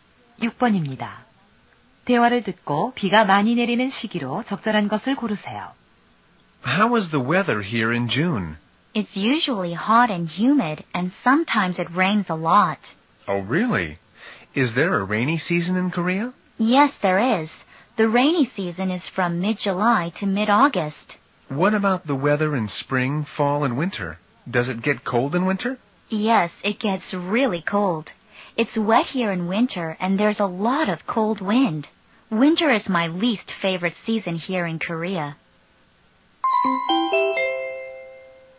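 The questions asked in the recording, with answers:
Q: 대화를 듣고 비가 많이 내리는 시기로 적절한 것을 고르세요.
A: 7월 중순부터 8월 중순까지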